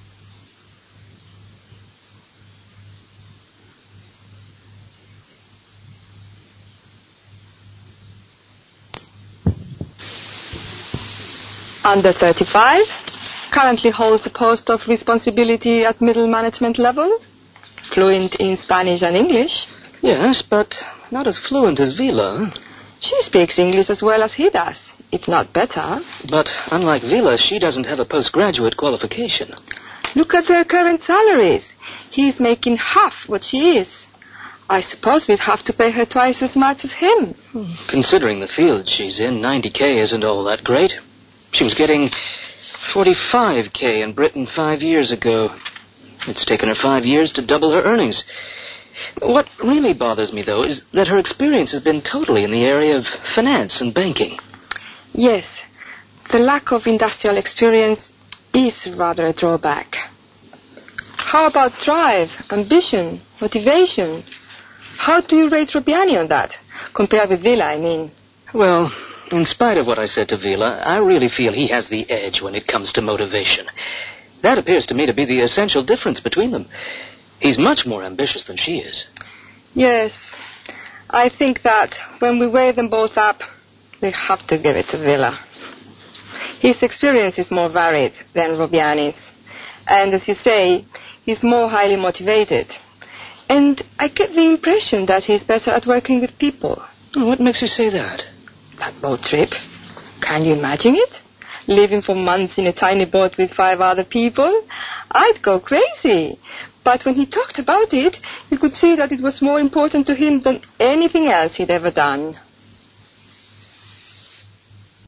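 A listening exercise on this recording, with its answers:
Listen to a conversation in which two people are discussing who to select for a post in their office. As you listen, decide whether each of the following statements is true or false. You will hear the tape twice.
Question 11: The male applicant (Mr. Villa) speaks English better than the female one (Ms. Robbiani).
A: False

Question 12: Mr. Villa has a post graduate qualification.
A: True

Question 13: Ms. Robbiani earns much more than Mr. Villa.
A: True

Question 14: It took Ms. Robbiani two years to double her earnings.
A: False

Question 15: Ms. Robbiani has no experience in finance and banking.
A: False

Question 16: Mr. Villa shows more motivation in the job than his competitor.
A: True

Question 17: Mr. Villa has more experience in various fields than Ms. Robbiani.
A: True

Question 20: It seems that they are going to choose Mr. 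Villa for the post.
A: True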